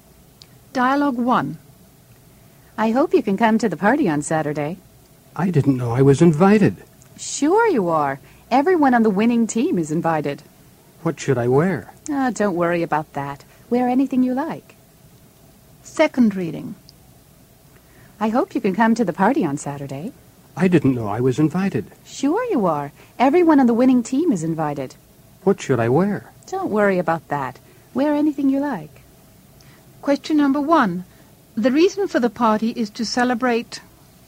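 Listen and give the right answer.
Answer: a win by the team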